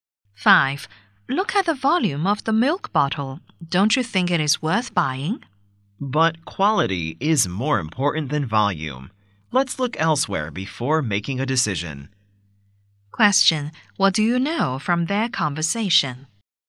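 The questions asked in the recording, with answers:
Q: What do you know from their conversation?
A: They haven't decided to buy the milk; they will look elsewhere.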